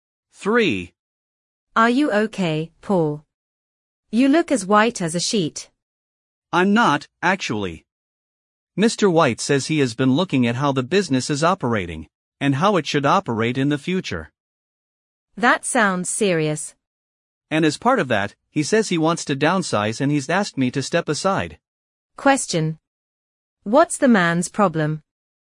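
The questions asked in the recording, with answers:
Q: What's the man's problem?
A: He is being asked to leave his job (laid off).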